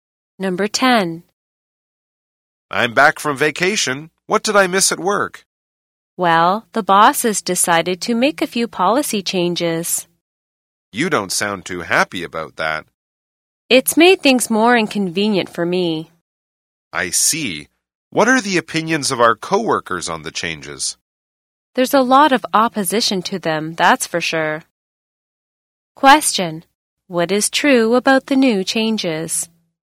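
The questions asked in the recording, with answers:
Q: What is true about the new changes?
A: Many coworkers oppose them; they made things more inconvenient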